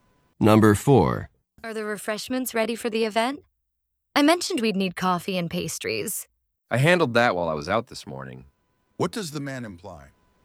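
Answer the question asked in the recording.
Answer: The refreshments are already taken care of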